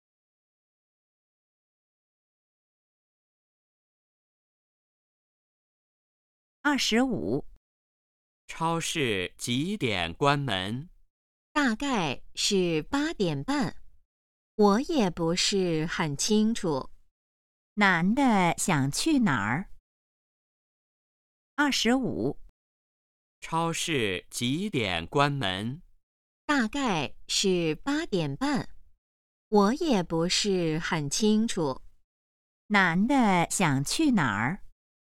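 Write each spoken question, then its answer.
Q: 男的想去哪儿?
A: 超市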